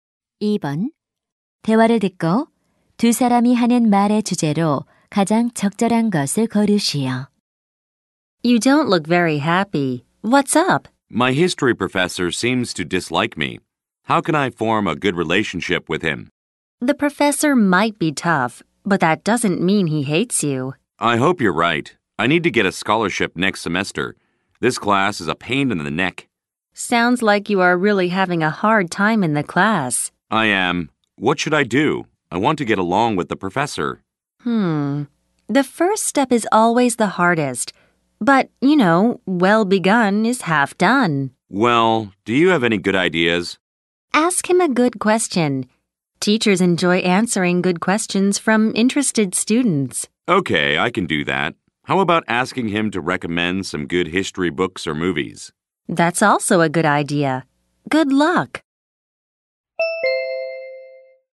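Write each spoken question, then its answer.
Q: 대화를 듣고 두 사람이 하는 말의 주제로 가장 적절한 것을 고르시오.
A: 교수님과 좋은 관계를 맺는 방법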